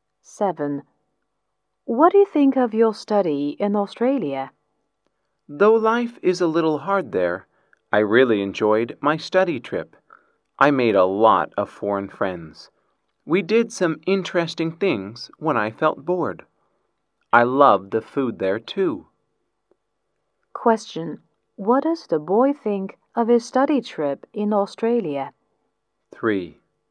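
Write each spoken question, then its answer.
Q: Question, what does the boy think of his study trip in Australia?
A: He really enjoyed it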